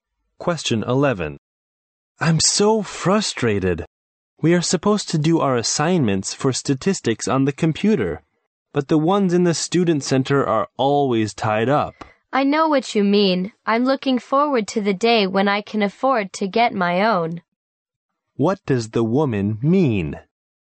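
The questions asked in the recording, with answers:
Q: What does the woman mean?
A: She wishes she could afford her own computer.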